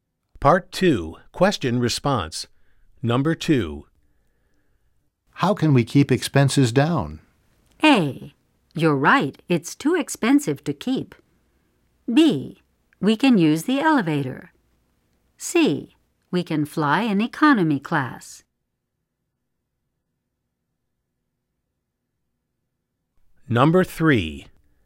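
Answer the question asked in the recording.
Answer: C: We can fly in economy class.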